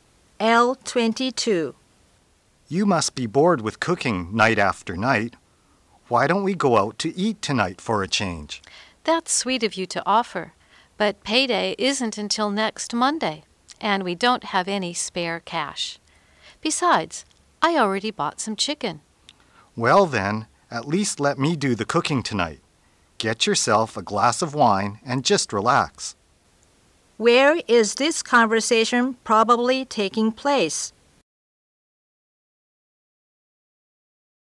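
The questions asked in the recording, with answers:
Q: Where is this conversation probably taking place?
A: At home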